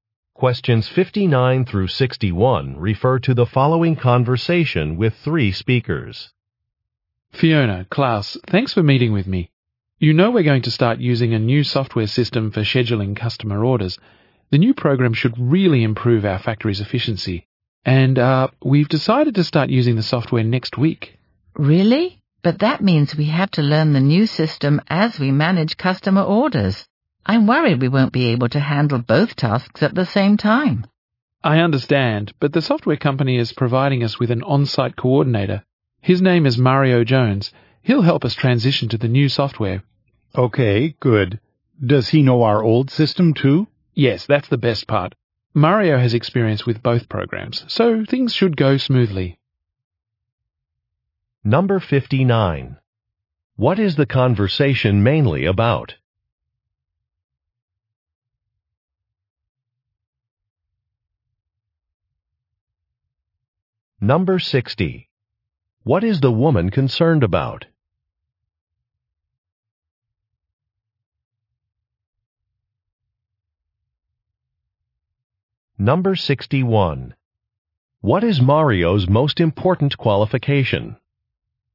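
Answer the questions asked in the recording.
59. Starting to use new scheduling software
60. Learning the new system while managing orders
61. He has experience with both programs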